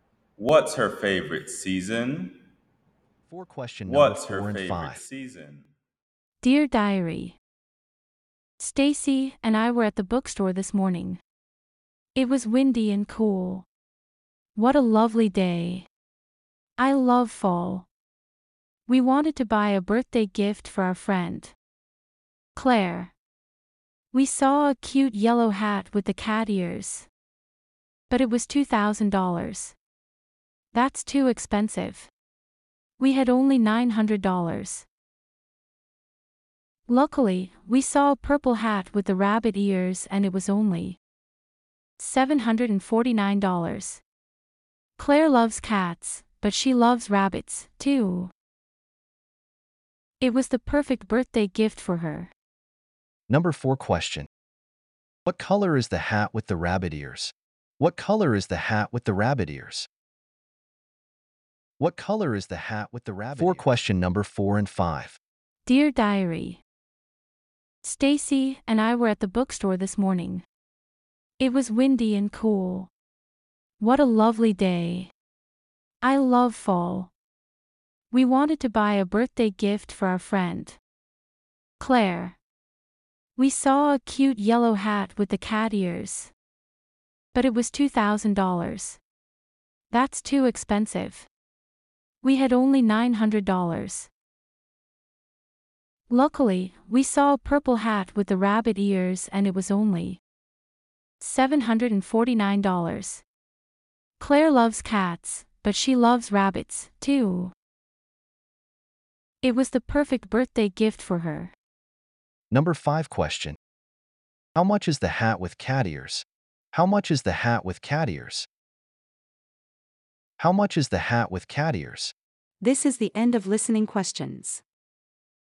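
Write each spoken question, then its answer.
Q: What color is the hat with the rabbit ears?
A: Purple

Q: How much is the hat with cat ears?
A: $2,000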